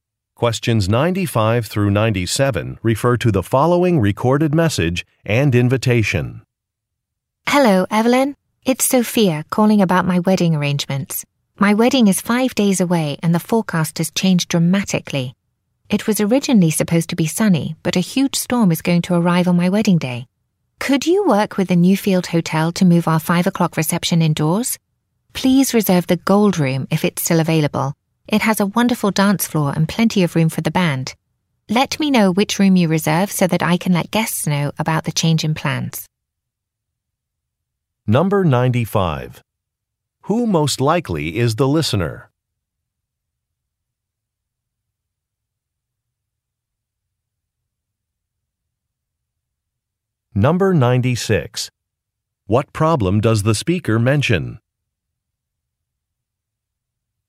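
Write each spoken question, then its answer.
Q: Who most likely is the listener?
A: A wedding planner

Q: What problem does the speaker mention?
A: A storm is forecast for the wedding day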